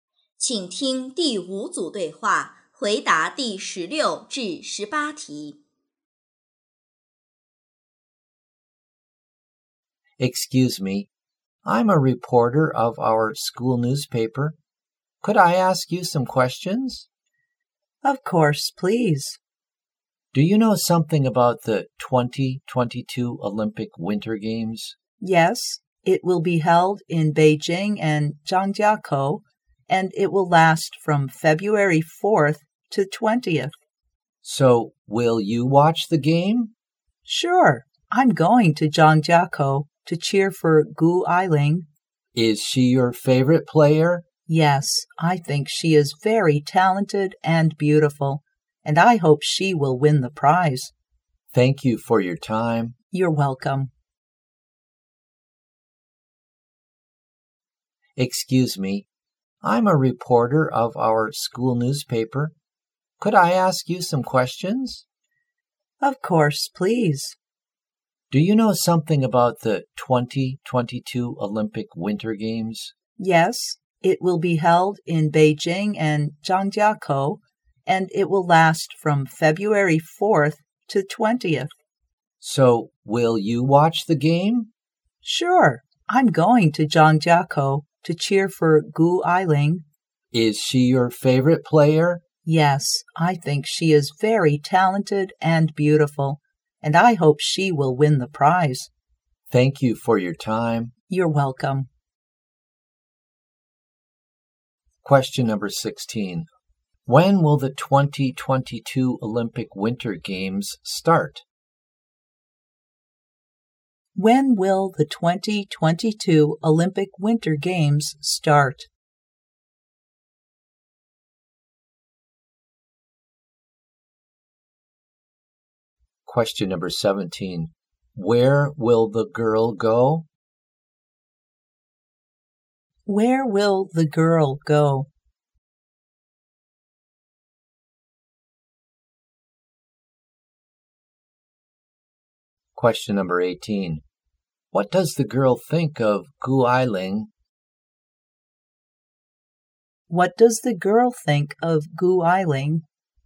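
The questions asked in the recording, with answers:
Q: When will the 2022 Olympic Winter Games start?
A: On February 4th

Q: Where will the girl go?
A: Zhangjiakou

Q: What does the girl think of Gu Ailing?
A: Very talented and beautiful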